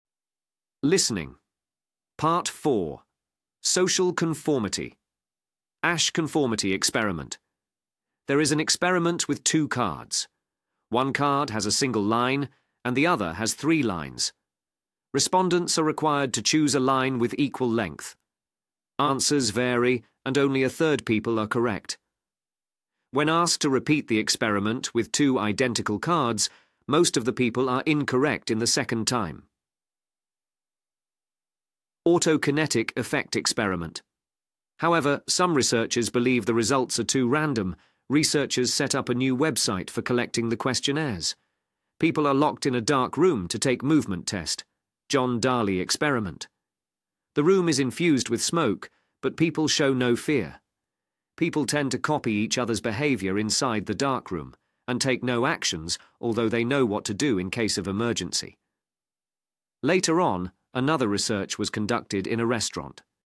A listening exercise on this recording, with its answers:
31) Respondents are required to choose a line with equal 31. __________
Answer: length

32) Answers vary and only 32. __________ of people are correct.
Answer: 1/3

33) When asked to repeat the experiment with two identical cards, most of the people are 33. __________ in the second time.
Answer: incorrect

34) Researchers set up a new 34. __________ for collecting the questionnaires.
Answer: website

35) People are locked in a dark room to take 35. __________ test.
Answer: movement

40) Later on, another research was conducted in a 40. __________ setting.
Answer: restaurant